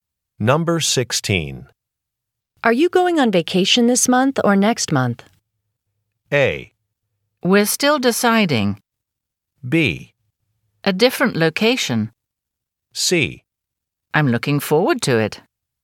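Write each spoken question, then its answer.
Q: Are you going on vacation this month or next month?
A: A: We're still deciding.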